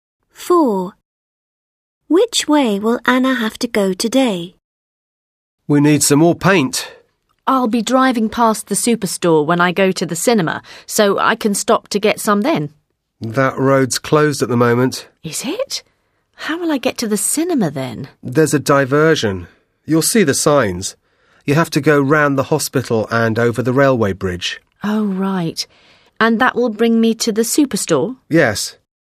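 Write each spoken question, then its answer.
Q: Which way will Anna have to go today?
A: Round the hospital and over the railway bridge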